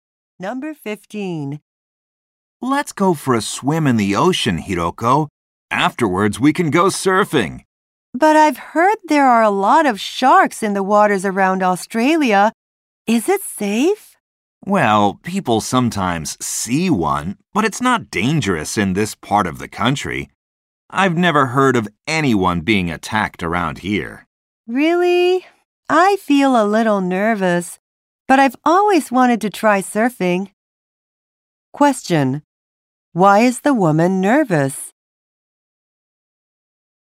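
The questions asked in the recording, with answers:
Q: Why is the woman nervous?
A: She heard there are many sharks in Australian waters.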